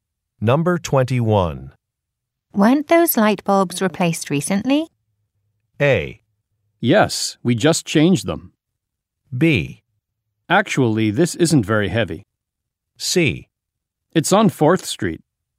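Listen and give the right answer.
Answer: A: Yes, we just changed them.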